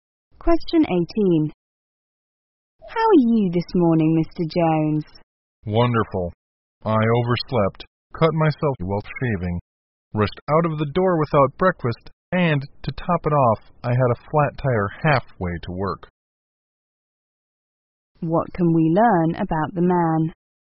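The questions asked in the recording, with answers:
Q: What can we learn about the man?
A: He had a bad morning.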